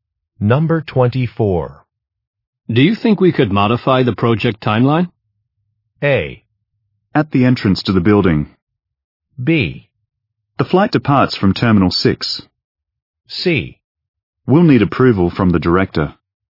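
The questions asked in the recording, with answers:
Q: Do you think we could modify the project timeline?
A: C: We'll need approval from the director.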